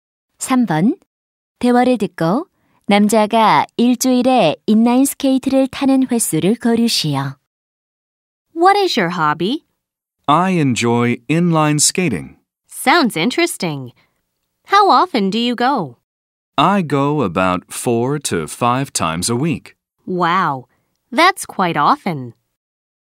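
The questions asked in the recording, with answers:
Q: 대화를 듣고 남자가 일주일에 인라인 스케이트를 타는 횟수를 고르시오.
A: 4~5번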